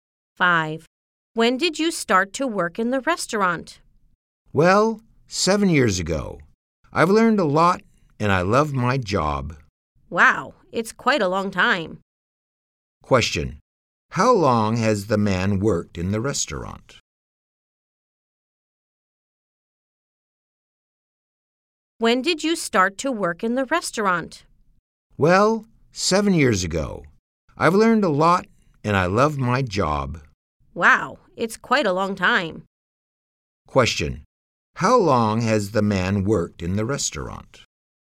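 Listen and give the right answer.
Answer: For 7 years.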